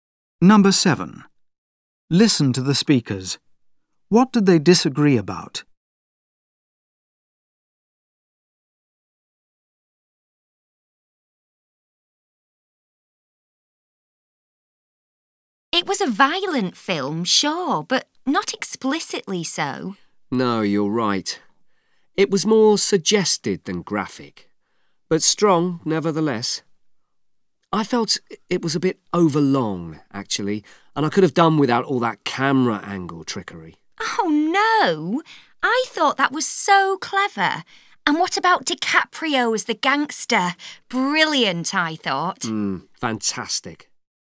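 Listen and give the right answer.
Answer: The camera angle trickery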